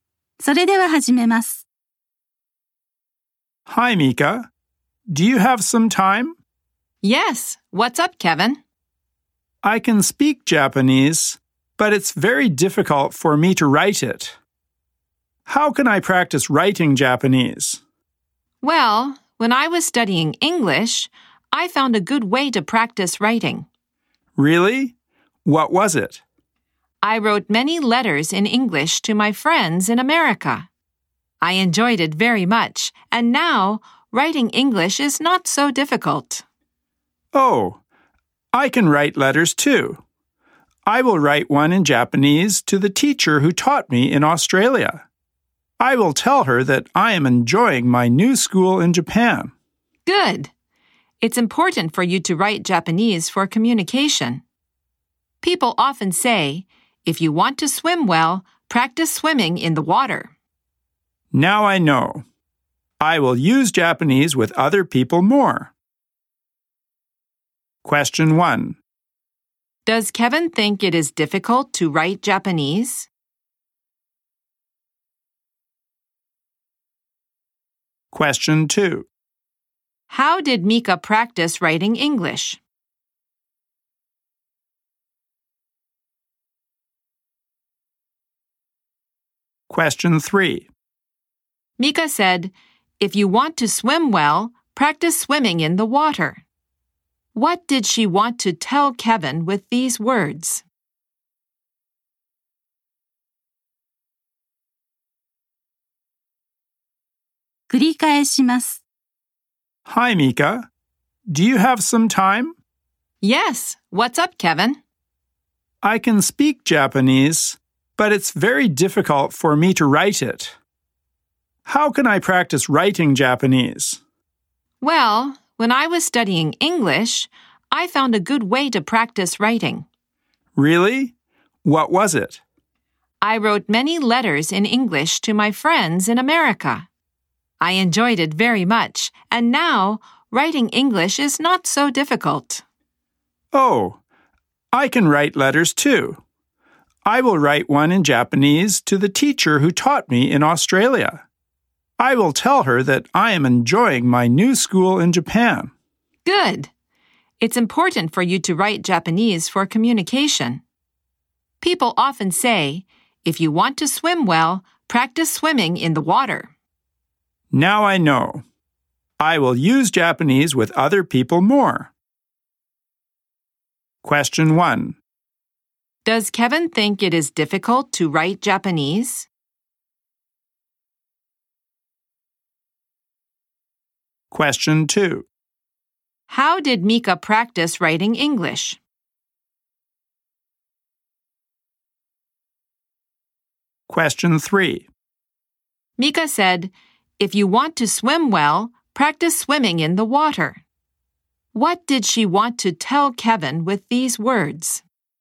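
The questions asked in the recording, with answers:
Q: Does Kevin think it is difficult to write Japanese?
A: Yes, he does.

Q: How did Mika practice writing English?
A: She wrote many letters in English to her friends in America.

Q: What did she want to tell Kevin with these words?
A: To improve, he should actually use Japanese with other people.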